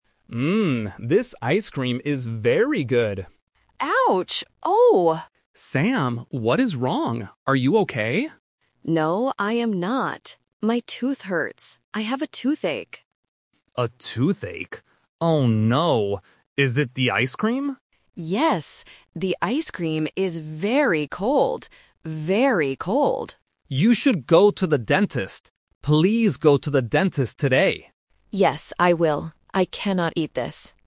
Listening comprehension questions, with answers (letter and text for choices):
Listen to the conversation. Circle the correct answer (A, B, or C).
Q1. What is Sam's problem?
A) He has a stomachache.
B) He has a headache.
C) He has a toothache.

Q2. How is the ice cream?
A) Very hot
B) Very cold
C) Very old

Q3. Where should Sam go today?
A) To the dentist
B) To the hospital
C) To the pharmacy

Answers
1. C) He has a toothache.
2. B) Very cold
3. A) To the dentist

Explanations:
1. Sam explicitly says, "I have a toothache." Option A (stomachache) is a trap because they are eating, which often causes stomach issues. Option B (headache) is a phonetic trap using the same "-ache" ending.
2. Sam clearly states, "The ice cream is very cold," and repeats the phrase "Very cold" (A1 repetition technique). Option A (Very hot) is a trap using the exact opposite temperature. Option C (Very old) is a phonetic trap because "cold" and "old" sound very similar to beginners.
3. Alex advises Sam: "You should go to the dentist," and repeats the word "dentist". Options B (hospital) and C (pharmacy) are plausible places to go when you are sick, but they are not mentioned in the dialogue.

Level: A1